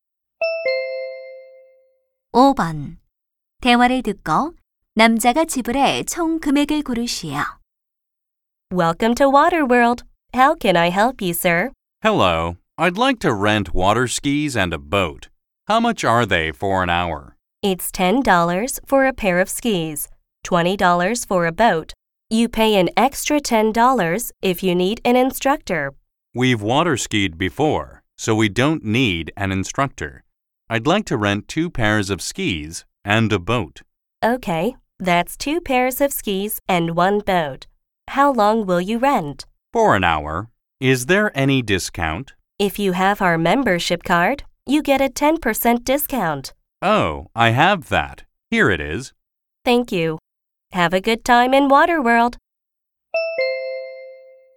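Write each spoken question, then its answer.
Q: 대화를 듣고 남자가 지불해 총 금액을 고르시오.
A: 36달러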